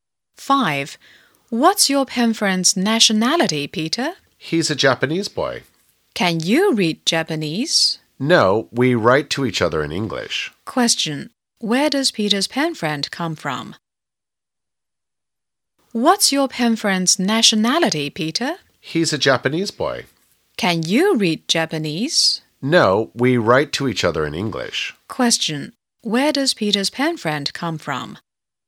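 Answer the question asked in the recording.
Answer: Japan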